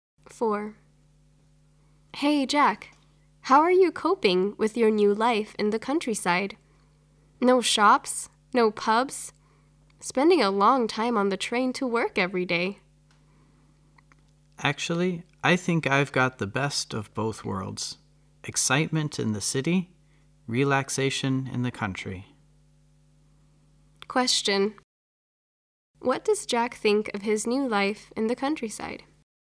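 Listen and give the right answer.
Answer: He enjoys it; he gets the best of both worlds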